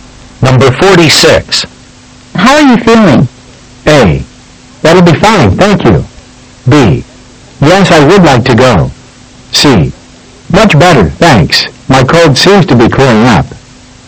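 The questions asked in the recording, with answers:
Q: How are you feeling?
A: C: Much better, thanks. My cold seems to be clearing up.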